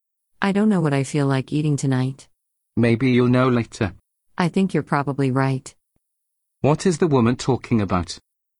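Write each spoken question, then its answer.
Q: What is the woman talking about?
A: What to eat tonight.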